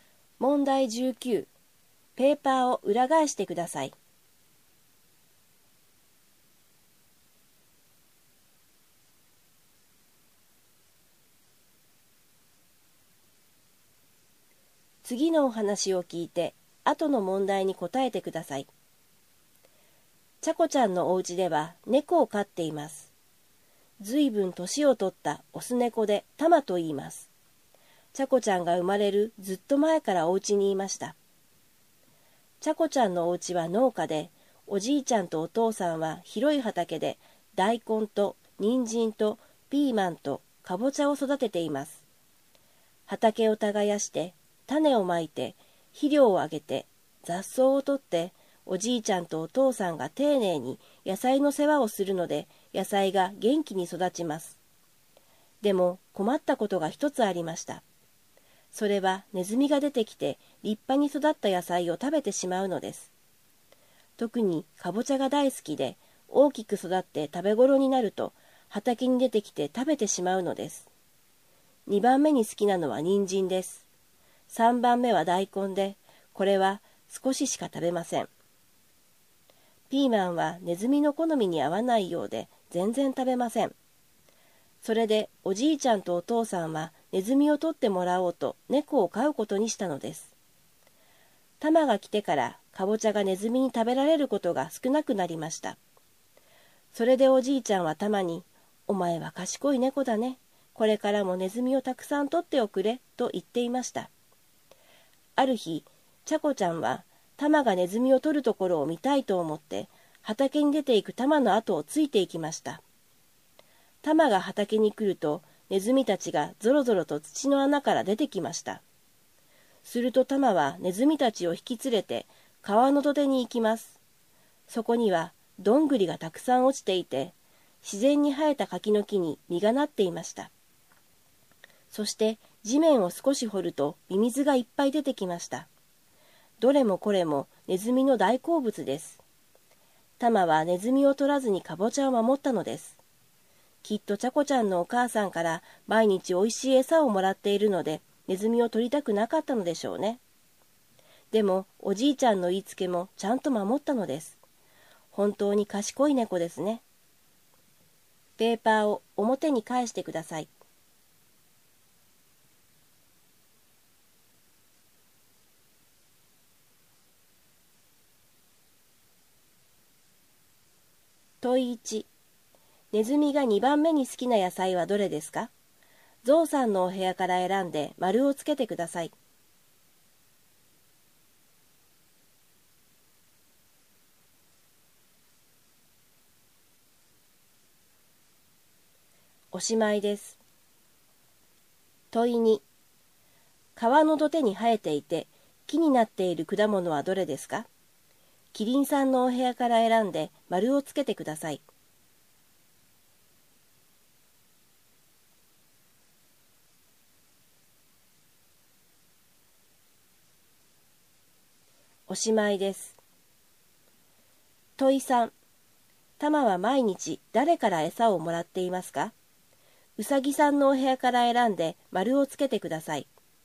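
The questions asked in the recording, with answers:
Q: ネズミが2番目に好きな野菜はどれですか?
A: 人参

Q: タマは毎日誰から餌をもらっていますか?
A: ちゃこちゃんのお母さん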